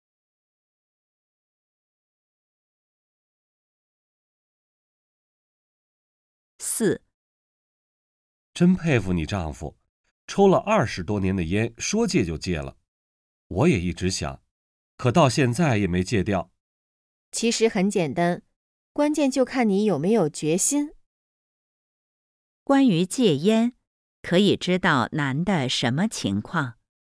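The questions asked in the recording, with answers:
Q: 关于戒烟,可以知道男的什么情况?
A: 一直想戒烟,但还没戒掉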